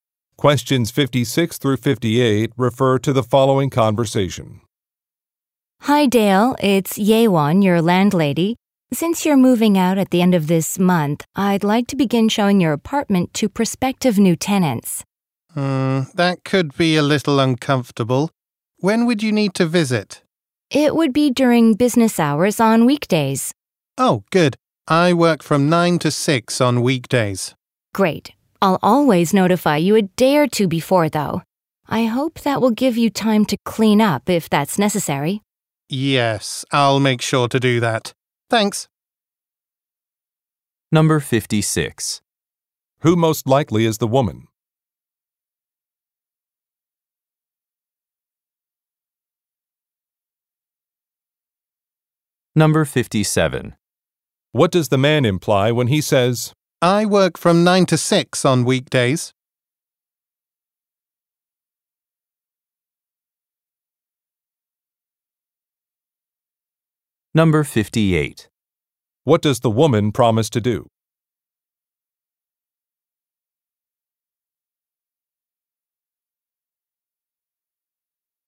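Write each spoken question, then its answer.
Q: Who most likely is the woman?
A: A landlady (property owner)

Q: What does the man imply when he says, I work from 9 to 6 on weekdays?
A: He will not be home during the visits, so they won't bother him

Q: What does the woman promise to do?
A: Notify him a day or two before visiting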